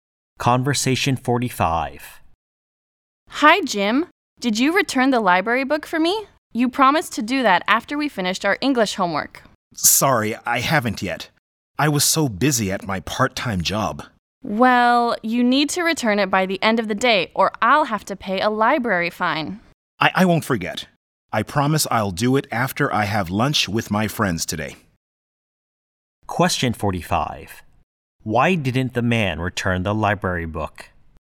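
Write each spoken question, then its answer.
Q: Why didn't the man return the library book?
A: He was busy at his part-time job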